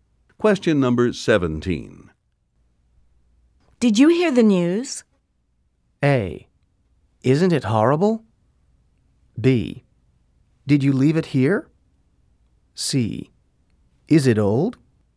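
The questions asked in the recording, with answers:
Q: Did you hear the news?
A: A: Isn't it horrible?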